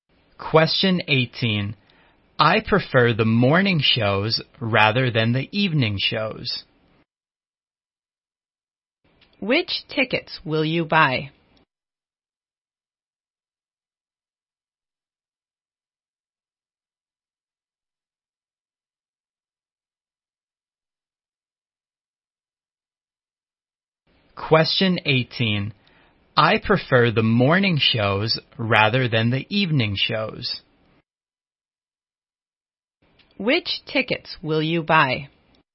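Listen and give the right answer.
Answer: Tickets for the morning shows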